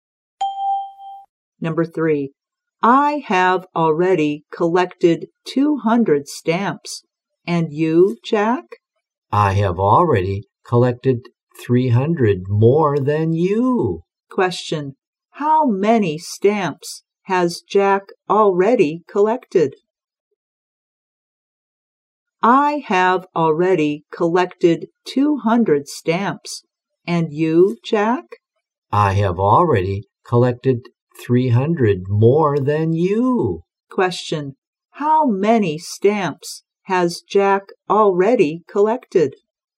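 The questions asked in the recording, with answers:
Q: how many stamps has Jack already collected?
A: 500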